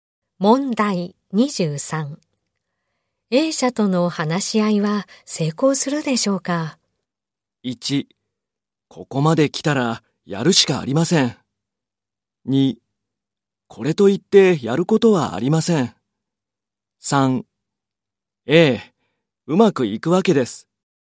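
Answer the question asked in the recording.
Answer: 1: ここまで来たらやるしかありません。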